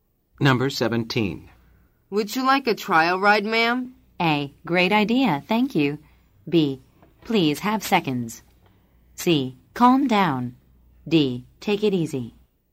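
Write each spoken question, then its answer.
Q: Would you like a trial ride, ma'am?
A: A: Great idea, thank you.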